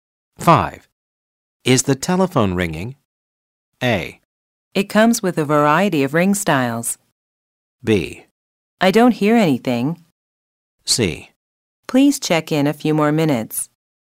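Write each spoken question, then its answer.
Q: Is the telephone ringing?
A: B: I don't hear anything.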